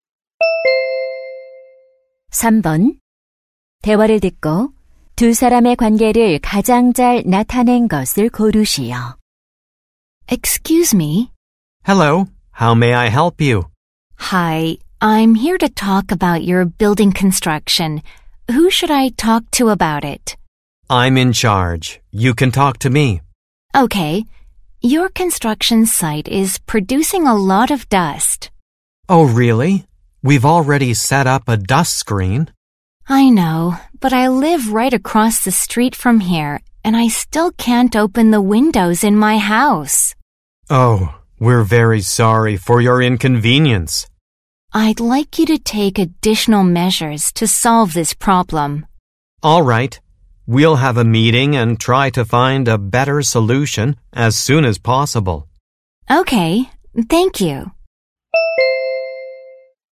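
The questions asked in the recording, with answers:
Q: 대화를 듣고 두 사람의 관계를 가장 잘 나타낸 것을 고르시오.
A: 공사 현장 책임자 - 인근 주민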